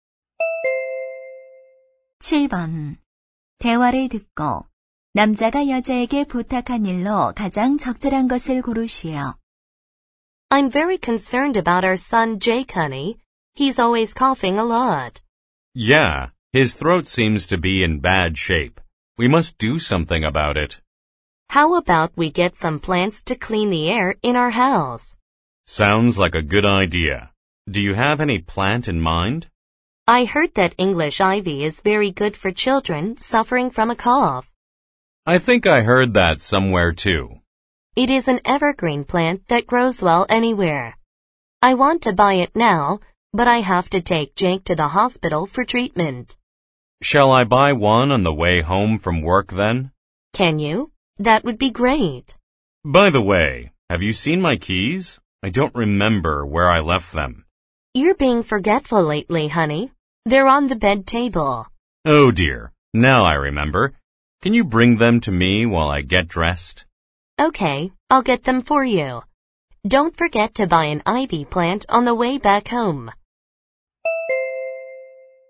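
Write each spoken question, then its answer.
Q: 대화를 듣고 남자가 여자에게 부탁한 일로 가장 적절한 것을 고르시오.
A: 열쇠 가져다주기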